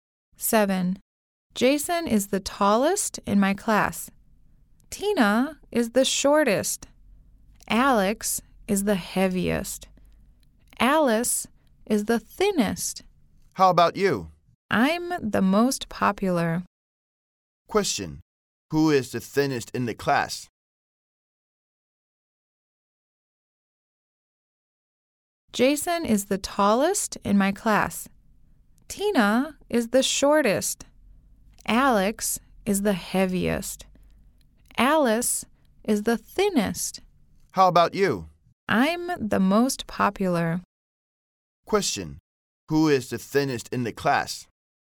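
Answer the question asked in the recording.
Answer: Alice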